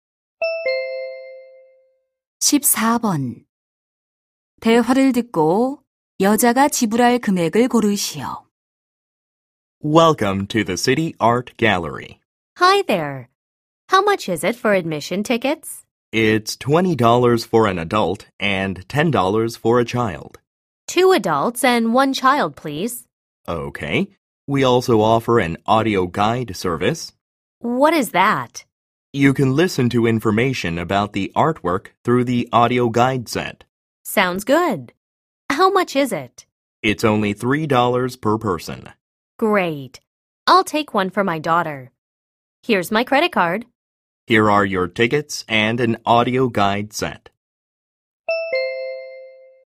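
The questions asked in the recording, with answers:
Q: 대화를 듣고 여자가 지불할 금액을 고르시오.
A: $53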